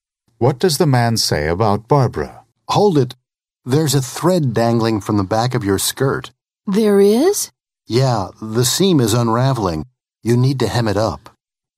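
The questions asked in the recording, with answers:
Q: What does the man tell the woman?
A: The seam of her skirt is coming apart and needs hemming.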